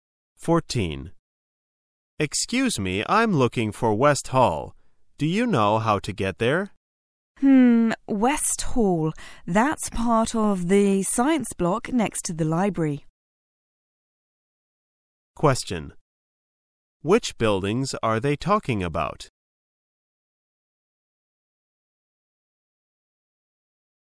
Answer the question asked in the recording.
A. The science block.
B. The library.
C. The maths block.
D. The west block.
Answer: A. The science block.

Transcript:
[解析] M: Excuse me. I'm looking for West Hall. Do you know how to get there? West Hall. That's part of the science block, next to the library. Q: Which buildings are they talking about?